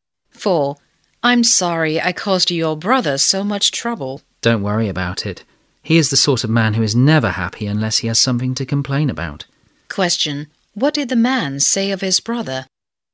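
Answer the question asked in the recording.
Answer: He is always complaining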